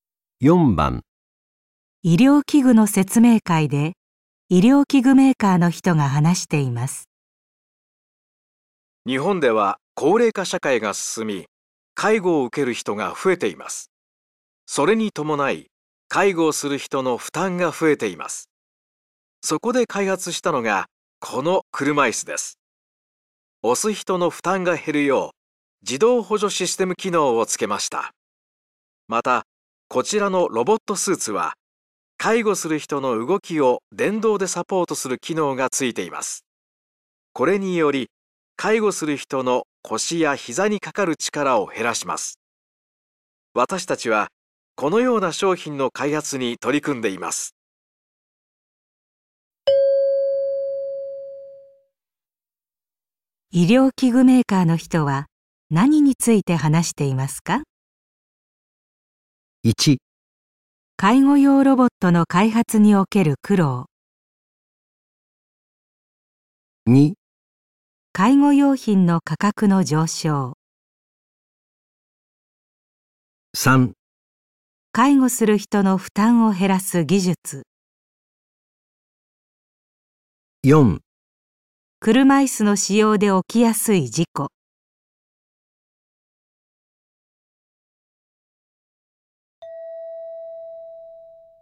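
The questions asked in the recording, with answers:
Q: 医療器具メーカーの人は何について話していますか?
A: 3: 介護する人の負担を減らす技術。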